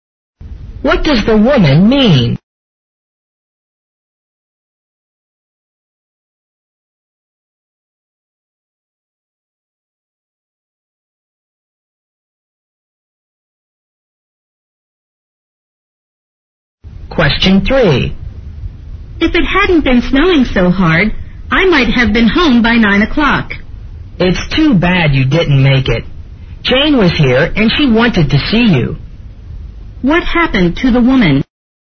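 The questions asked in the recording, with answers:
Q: What happened to the woman?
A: She was delayed by the heavy snow and got home late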